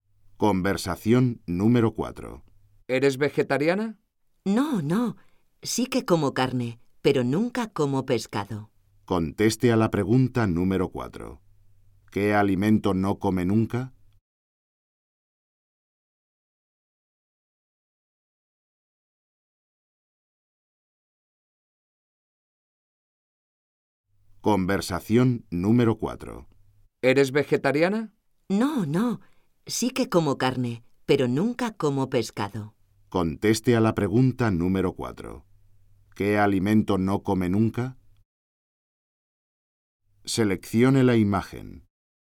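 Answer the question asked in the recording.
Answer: Pescado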